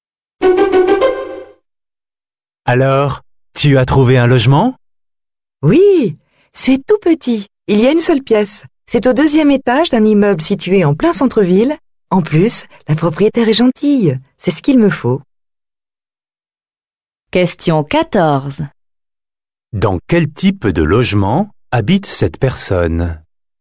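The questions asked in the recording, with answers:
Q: Dans quel type de logement habite cette personne?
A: Un petit studio d'une pièce au centre-ville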